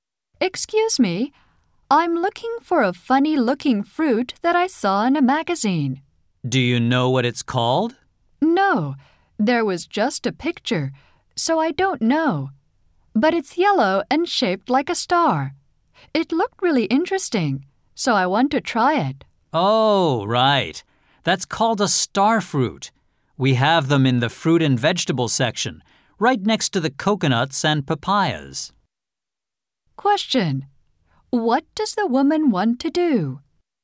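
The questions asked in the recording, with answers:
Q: What does the woman want to do?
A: Try (buy) a star fruit she saw in a magazine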